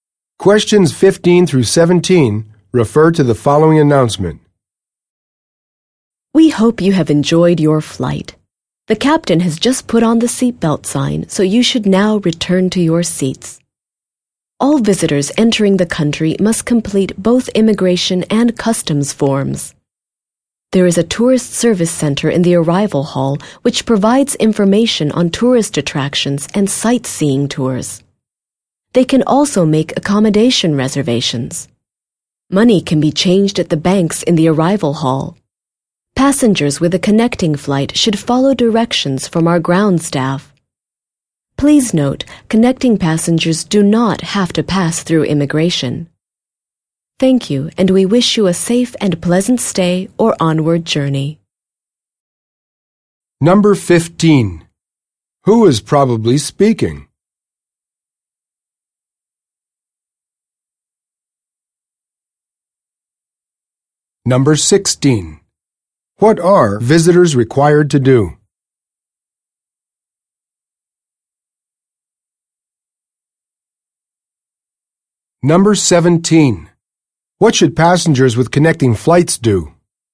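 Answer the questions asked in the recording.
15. A flight attendant
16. Complete immigration and customs forms
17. Follow directions from the ground staff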